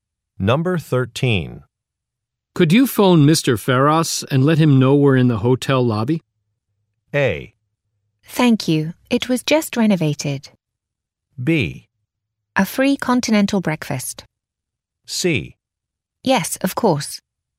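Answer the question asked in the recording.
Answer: C: Yes, of course.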